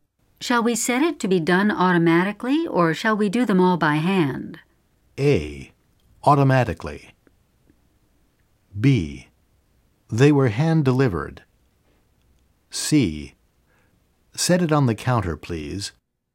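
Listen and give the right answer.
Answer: A: Automatically.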